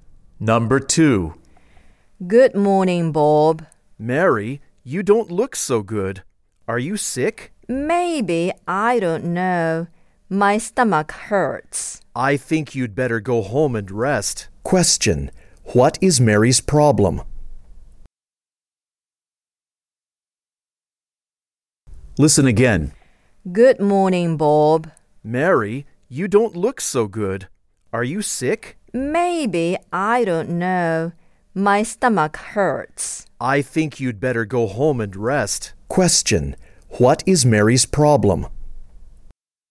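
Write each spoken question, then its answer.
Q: What is Mary's problem?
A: Her stomach hurts.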